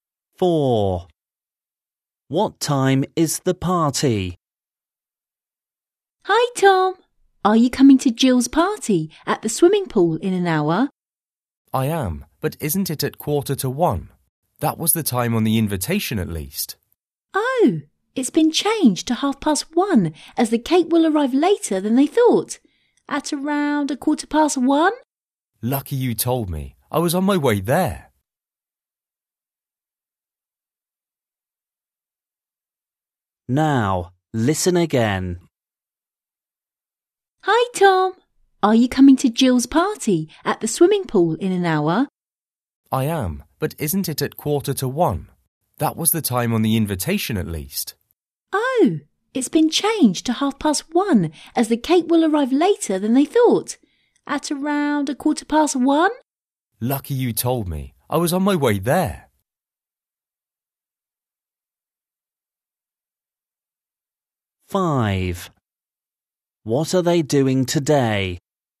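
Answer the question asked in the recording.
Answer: 1:30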